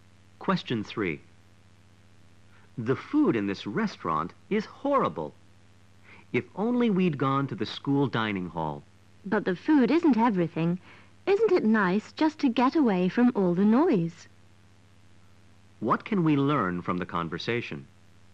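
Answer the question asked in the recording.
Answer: The food is bad, but the restaurant is quiet and nice to be in.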